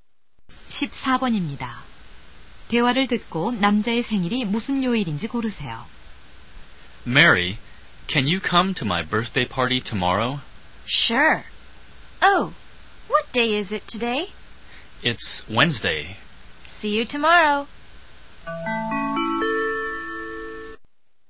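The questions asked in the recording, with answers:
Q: 대화를 듣고 남자의 생일이 무슨 요일인지 고르세요.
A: 목요일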